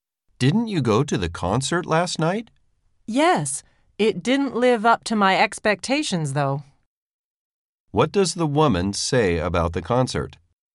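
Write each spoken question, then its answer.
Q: What does the woman say about the concert?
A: It was disappointing; it didn't live up to her expectations.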